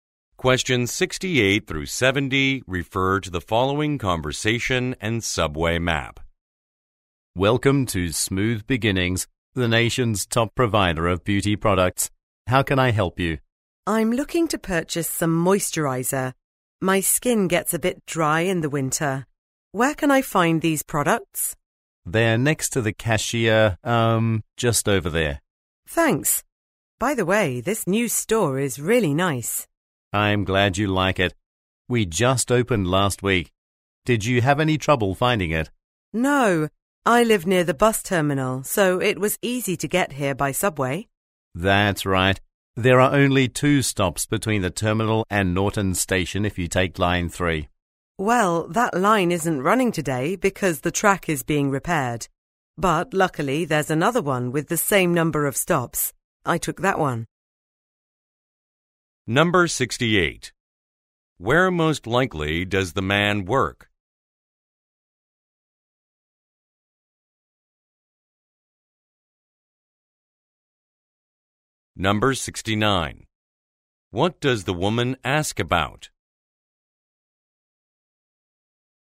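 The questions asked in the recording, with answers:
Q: Where most likely does the man work?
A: At a beauty products store

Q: What does the woman ask about?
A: Where to find moisturizer products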